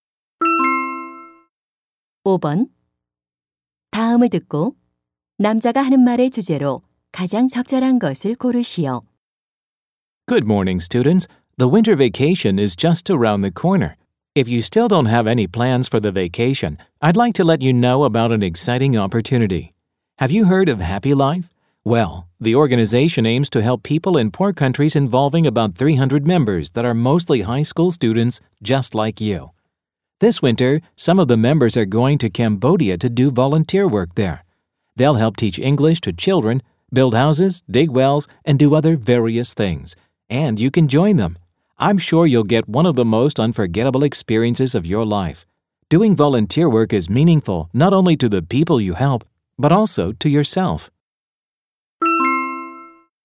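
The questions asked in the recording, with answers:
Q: 다음을 듣고 남자가 하는 말의 주제로 가장 적절한 것을 고르시오.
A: 겨울방학 해외 봉사활동 참여 권유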